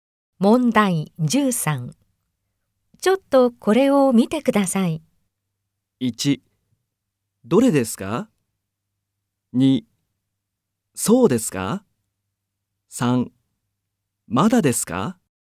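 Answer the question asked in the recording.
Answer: 1: どれですか?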